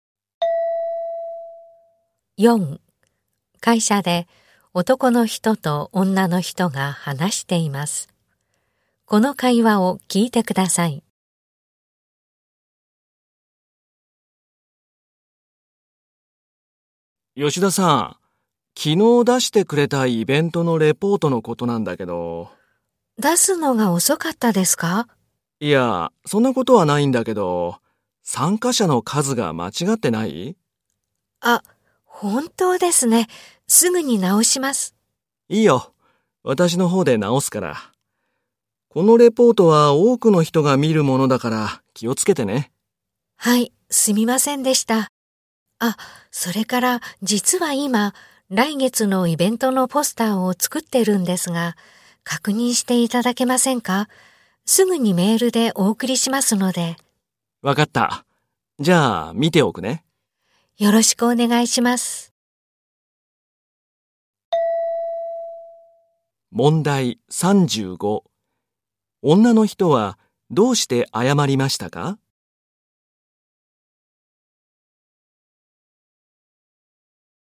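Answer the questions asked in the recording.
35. レポートの参加者の数が間違っていたから
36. ポスターをメールで送る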